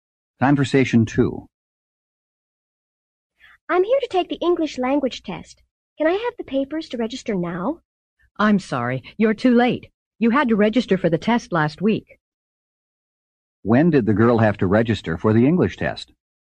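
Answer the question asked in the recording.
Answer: Last week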